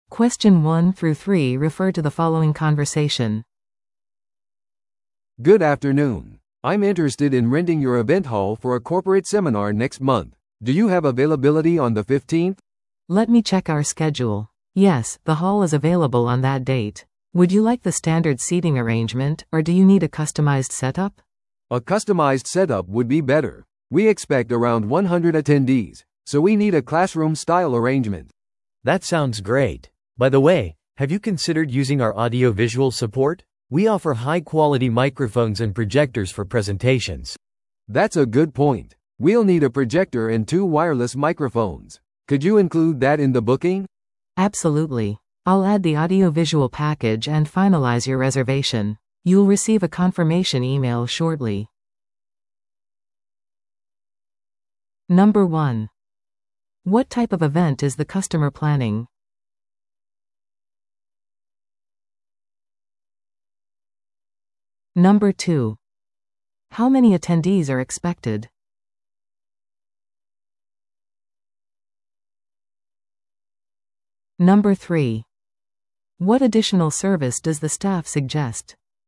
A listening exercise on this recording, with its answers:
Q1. What type of event is the customer planning?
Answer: 企業向けセミナー

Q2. How many attendees are expected?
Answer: 100人

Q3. What additional service does the staff suggest?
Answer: 音響・映像サポート

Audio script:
A: "Good afternoon. I'm interested in renting your event hall for a corporate seminar next month. Do you have availability on the 15th?"
B: "Let me check our schedule. Yes, the hall is available on that date. Would you like the standard seating arrangement, or do you need a customized setup?"
A: "A customized setup would be better. We expect around 100 attendees, so we need a classroom-style arrangement."
C: "That sounds great. By the way, have you considered using our audio-visual support? We offer high-quality microphones and projectors for presentations."
A: "That's a good point. We'll need a projector and two wireless microphones. Could you include that in the booking?"
B: "Absolutely. I'll add the audio-visual package and finalize your reservation. You'll receive a confirmation email shortly."